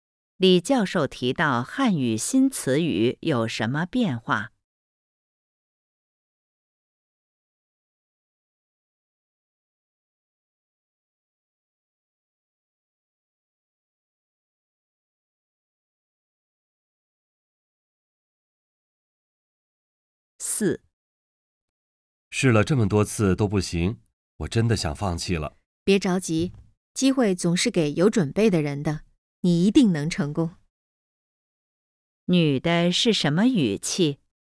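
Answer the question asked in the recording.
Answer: 鼓励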